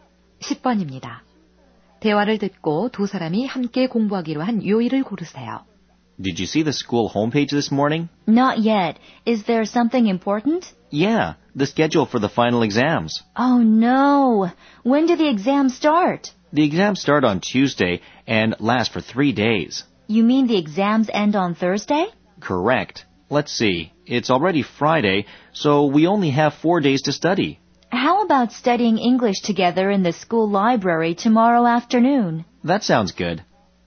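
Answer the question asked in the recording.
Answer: 토요일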